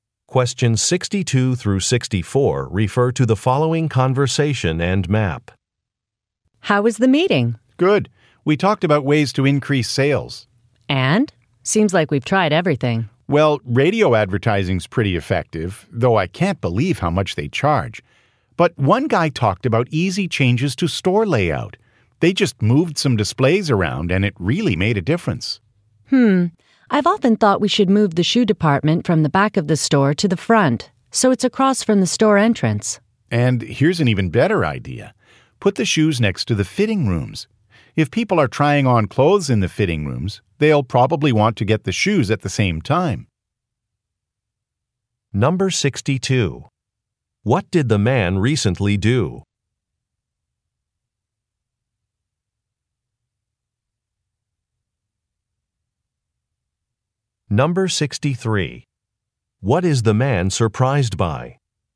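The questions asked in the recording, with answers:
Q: What did the man recently do?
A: He attended a meeting about increasing sales.

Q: What is the man surprised by?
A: How expensive radio advertising is.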